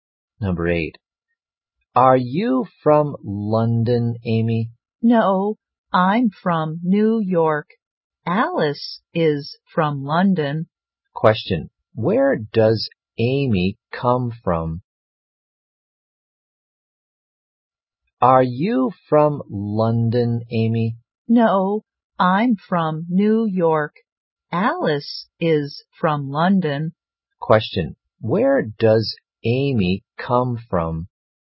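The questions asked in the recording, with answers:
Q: Question, where does Amy come from?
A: New York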